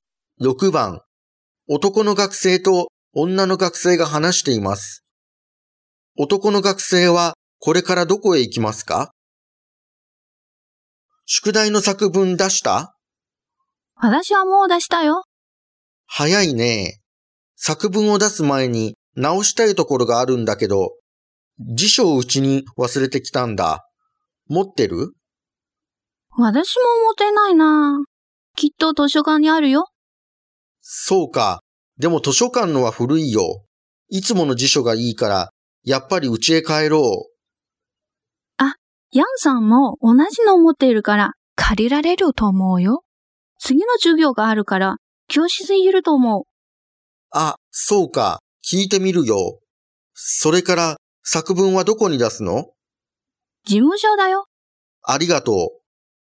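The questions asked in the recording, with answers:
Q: 男の学生はこれからどこへ行きますか?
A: 教室(ヤンさんに辞書を借りに)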